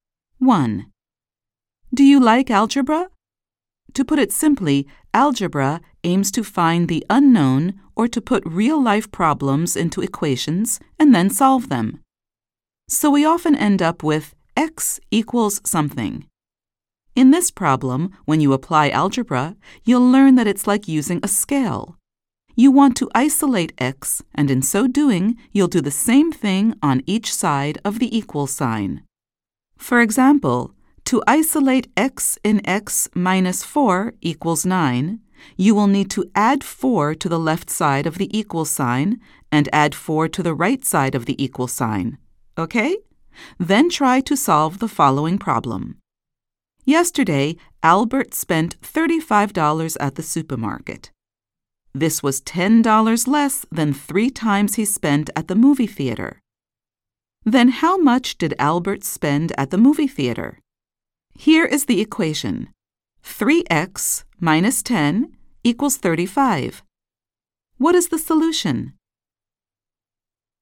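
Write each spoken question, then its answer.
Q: Then how much did Albert spend at the movie theater?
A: $15 (x = 15)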